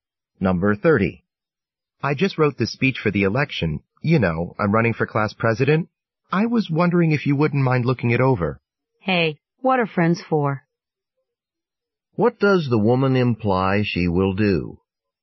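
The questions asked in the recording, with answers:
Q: What does the woman imply she will do?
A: Look over his speech.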